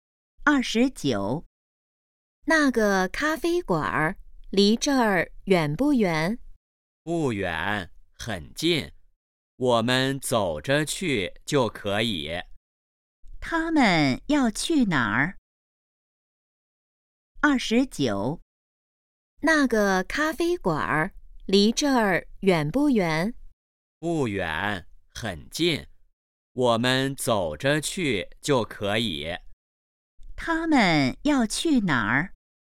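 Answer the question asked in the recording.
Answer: 咖啡馆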